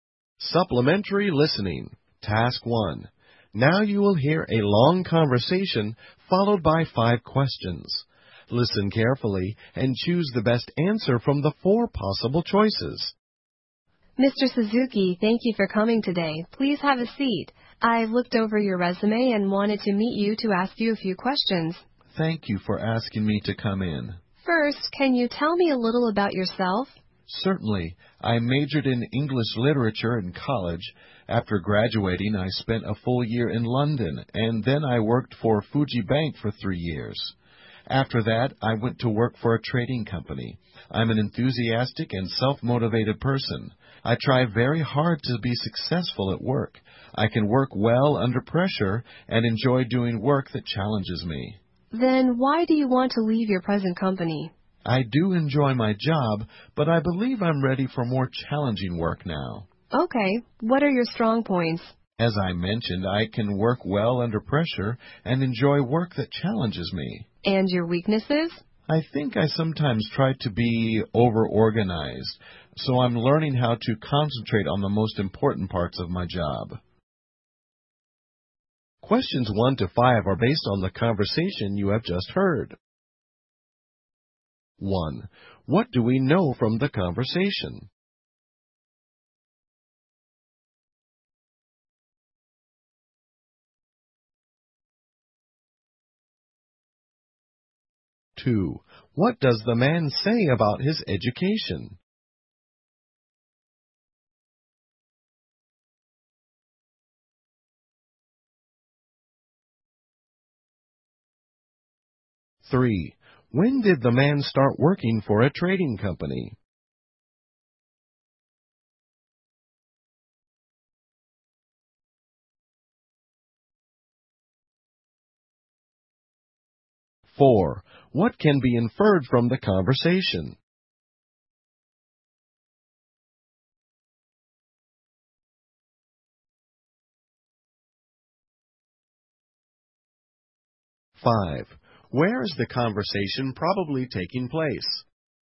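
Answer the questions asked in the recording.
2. He majored in English literature in college
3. After a year in London and three years at Fuji Bank
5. At a job interview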